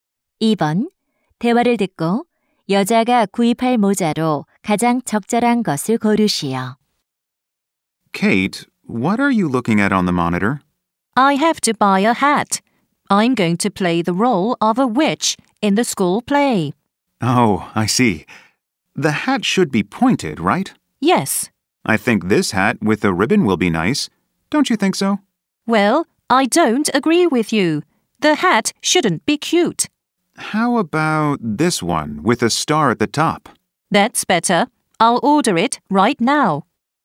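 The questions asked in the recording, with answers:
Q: 대화를 듣고 여자가 구입할 모자로 가장 적절한 것을 고르시오.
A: 꼭대기에 별이 달린 뾰족한 모자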